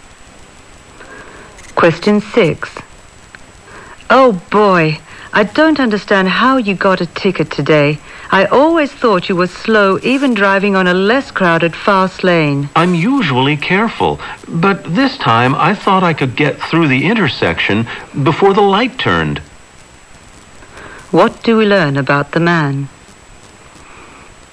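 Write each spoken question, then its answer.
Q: What do we learn about the man?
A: He got a ticket for running a red light.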